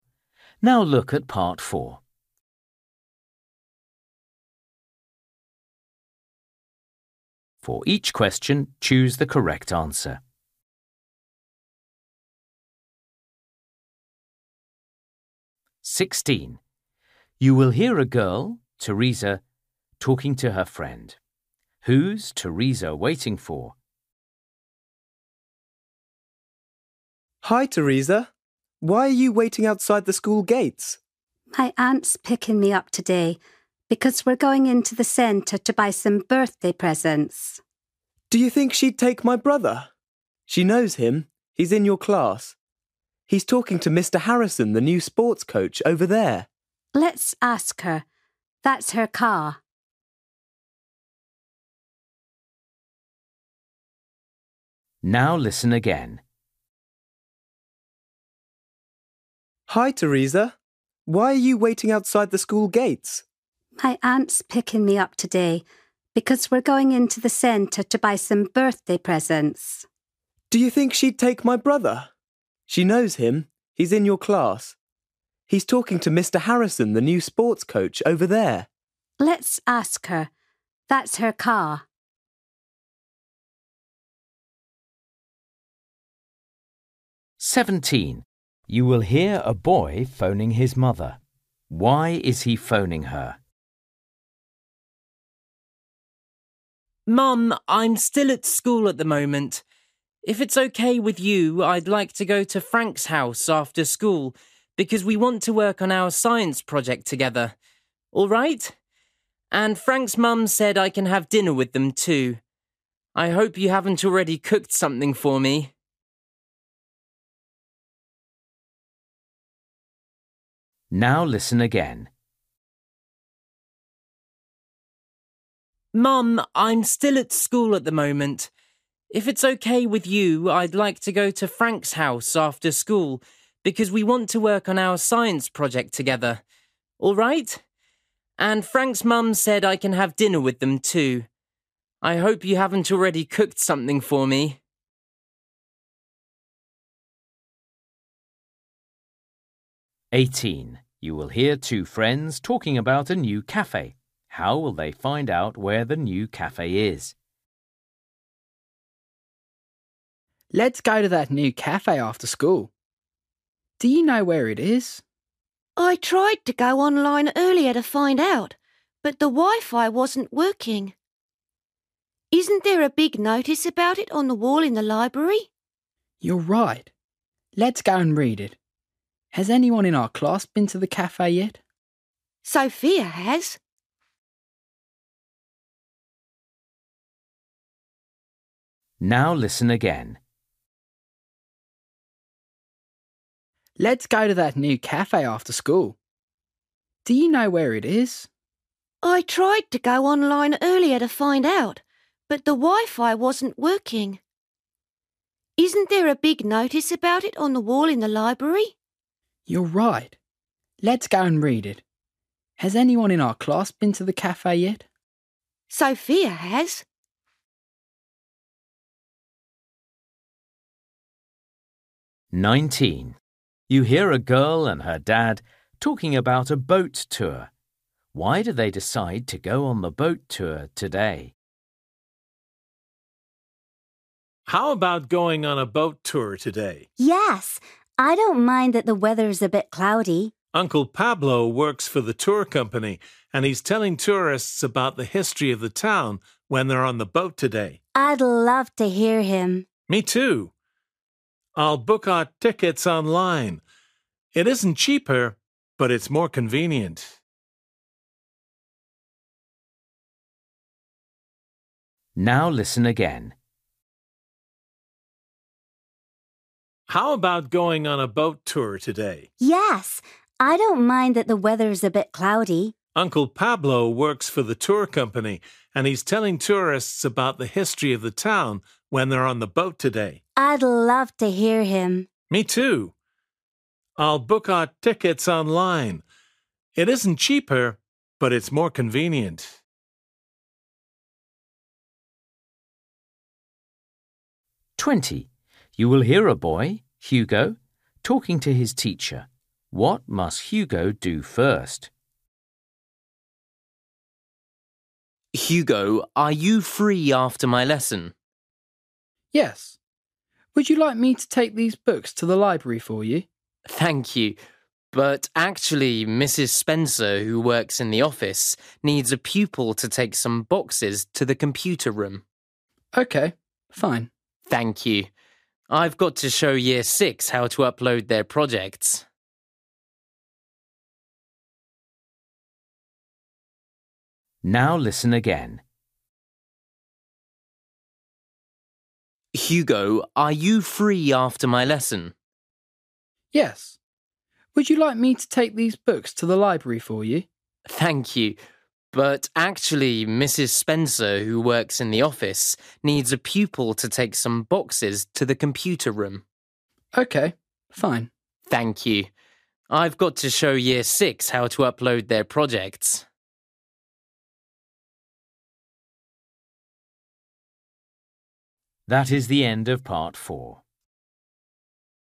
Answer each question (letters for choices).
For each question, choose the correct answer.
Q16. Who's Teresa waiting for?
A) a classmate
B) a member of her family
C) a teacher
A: B

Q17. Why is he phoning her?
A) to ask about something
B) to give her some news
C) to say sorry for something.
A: A

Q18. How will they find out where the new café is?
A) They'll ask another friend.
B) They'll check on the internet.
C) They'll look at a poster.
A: C

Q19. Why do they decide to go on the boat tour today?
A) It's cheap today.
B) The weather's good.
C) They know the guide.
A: C

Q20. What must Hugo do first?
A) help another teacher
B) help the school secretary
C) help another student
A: B

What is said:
16 You will hear a girl, Teresa, talking to her friend.
Steve: Hi Teresa, why are you waiting outside the school gates?
Teresa: My aunt's picking me up today because we're going into the centre to buy some birthday presents.
Steve: Do you think she'd take my brother? She knows him. He's in your class. He's talking to Mr Harrison, the new sports coach, over there.
Teresa: Let's ask her. That's her car.
17 You will hear a boy phoning his mother. Why is he phoning her?
Boy: Mum, I'm still at school at the moment. If it's OK with you, I'd like to go to Frank's house after school because we want to work on our science project together. All right? And Frank's mum's said I can have dinner with them too. I hope you haven't already cooked something for me.
18 You will hear two friends talking about a new café.
Boy: Let's go to that new café after school. Do you know where it is?
Girl: I tried to go online earlier to find out, but the wi-fi wasn't working. Isn't there a big notice about it on the wall in the library?
Boy: You're right, let's go and read it. Has anyone in our class been to the café yet?
Girl: Sophia has.
19 You hear a girl and her dad talking about a boat tour.
Dad: How about going on a boat tour today?
Girl: Yes! I don't mind that the weather's a bit cloudy.
Dad: Uncle Pablo works for the tour company and he's telling tourists about the history of the town when they're on the boat today!
Girl: I'd love to hear him!
Dad: Me too. I'll book our tickets online. It isn't cheaper, but it's more convenient.
20 You will hear a boy, Hugo, talking to his teacher. must Hugo do first?
Male: Hugo, are you free after my lesson?
Hugo: Yes, would you like me to take these books to the library for you?
Man: Thank you, but actually, Mrs Spencer, who works in the office, needs a pupil to take some boxes to the computer room.
Hugo: OK, fine.
Man: Thank you. I've got to show Year 6 how to upload their projects.

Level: A2